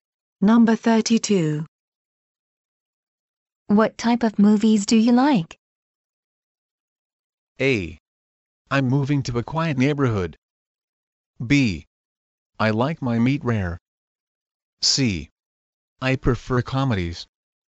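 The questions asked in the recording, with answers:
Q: What type of movies do you like?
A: C: I prefer comedies.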